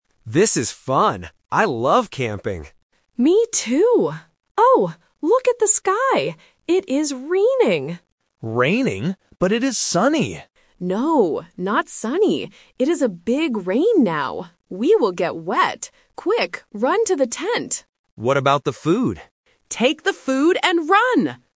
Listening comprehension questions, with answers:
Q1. What is the weather like now?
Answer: Raining

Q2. Where do they run to?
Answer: The tent

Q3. What do they take with them?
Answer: The food

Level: A1